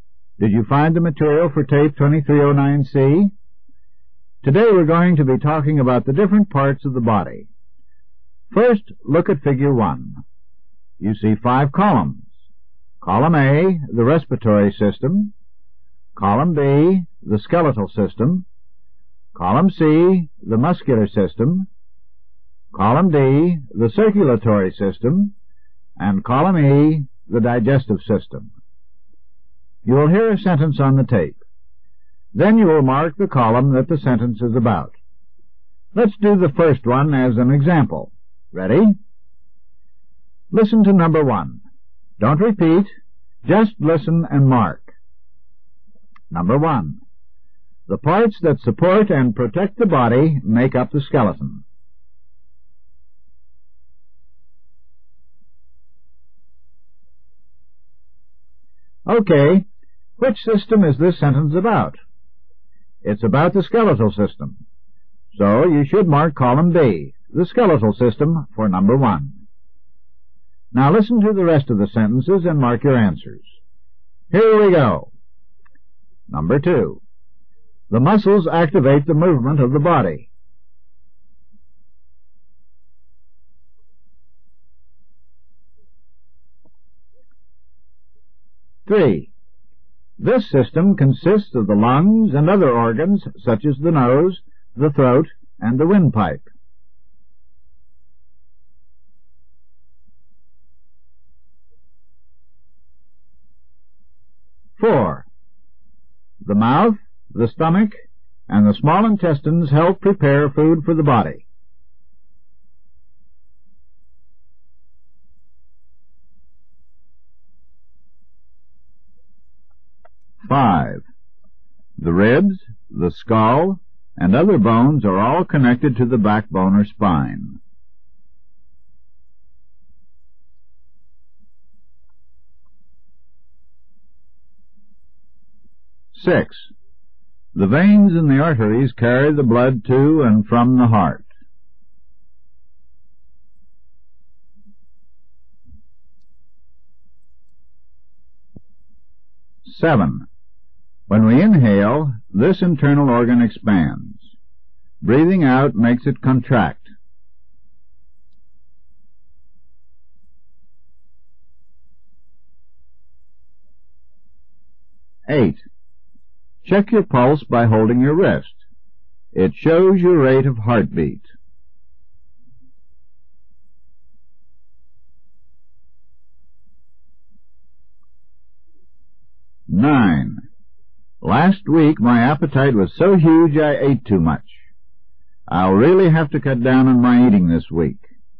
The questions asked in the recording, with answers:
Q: The muscles activate the movement of the body.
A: For number 2, you should have marked C.

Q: This system consists of the lungs and other organs, such as the nose, the throat, and the windpipe.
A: Number 3 should be marked A.

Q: The mouth, the stomach, and the small intestines help prepare food for the body.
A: The answer to number 4 is E, the digestive system.

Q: The ribs, the skull, and other bones are all connected to the backbone or spine.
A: Number 5 is B, the skeletal system.

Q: The veins and the arteries carry the blood to and from the heart.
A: Number six is D, the circulatory system.

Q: When we inhale, this internal organ expands.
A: Number seven is A, the respiratory system.

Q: Check your pulse by holding your wrist.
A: For number eight, you should have marked D, the circulatory system, again.

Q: Last week, my appetite was so huge I ate too much.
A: The correct answer for the last one, number nine, is E, the digestive system.